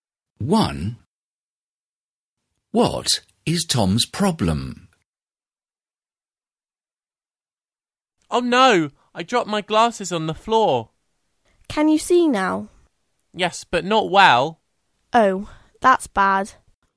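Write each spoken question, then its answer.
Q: What is Tom's problem?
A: He dropped his glasses and can't see well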